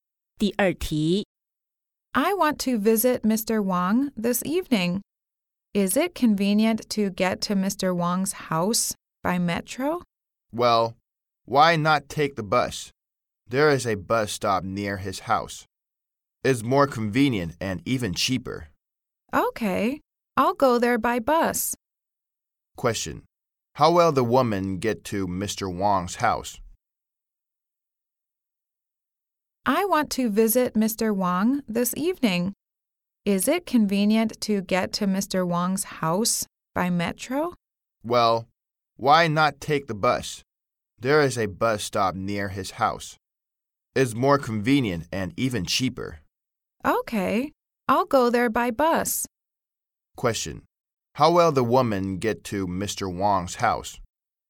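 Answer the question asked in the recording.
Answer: By bus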